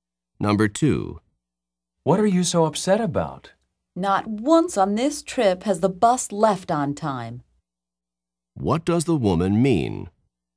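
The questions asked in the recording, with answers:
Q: What does the woman mean?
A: The bus has always left late on this trip.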